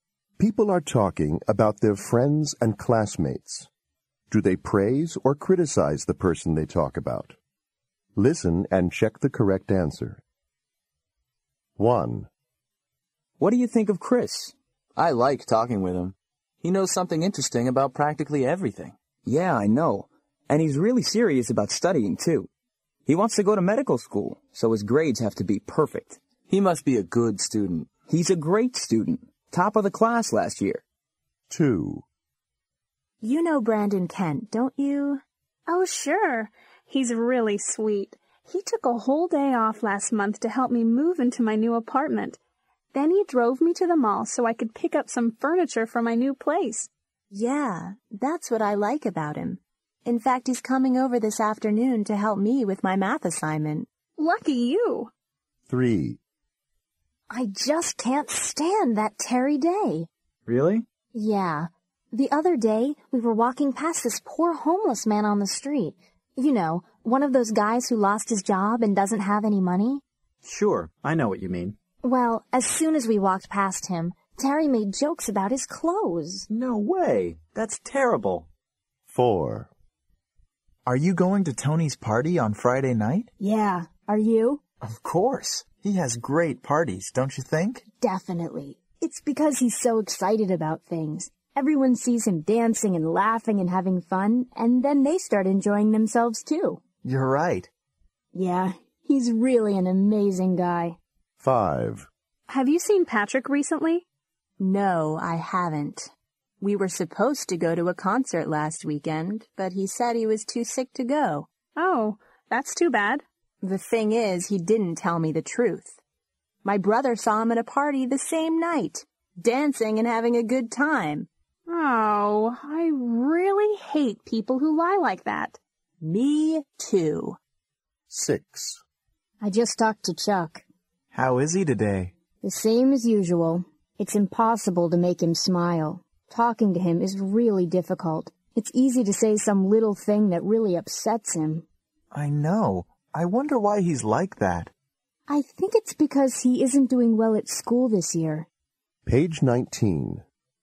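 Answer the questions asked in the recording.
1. praise
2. praise
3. criticize
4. praise
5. criticize
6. criticize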